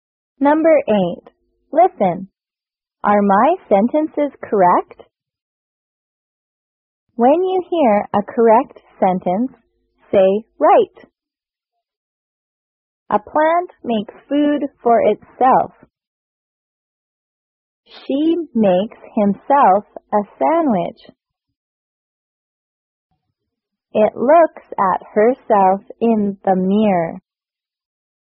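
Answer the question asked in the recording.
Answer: Only "A plant makes food for itself" is correct.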